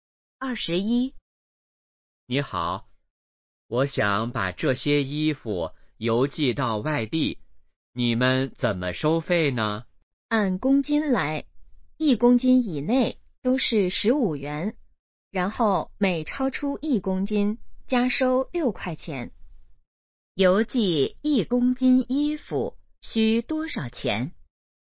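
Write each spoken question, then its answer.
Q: 邮寄一公斤衣服需多少钱?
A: 15元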